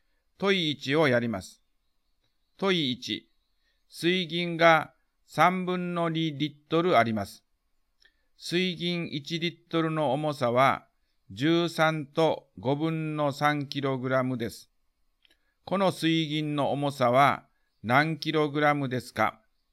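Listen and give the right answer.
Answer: 9と15分の1キログラム(15分の136キログラム)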